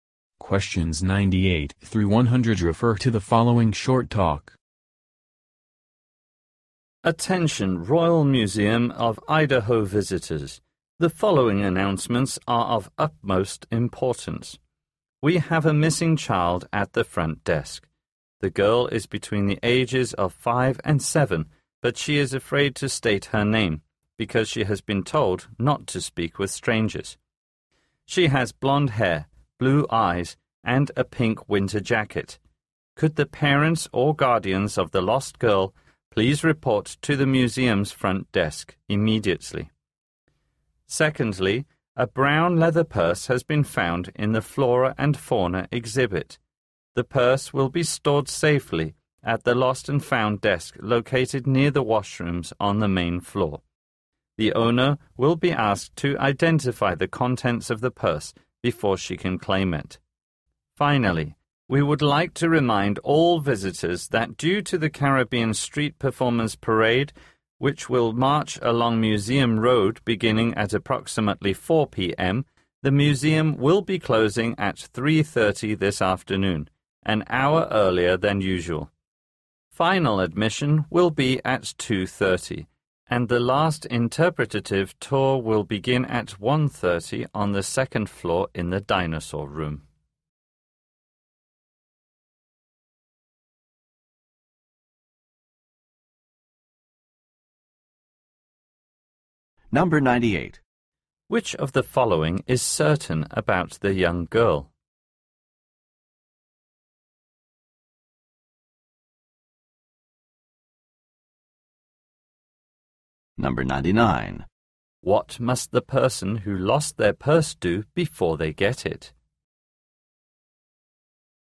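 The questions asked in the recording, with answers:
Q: What must the person who lost their purse do before they get it?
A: Identify the contents of the purse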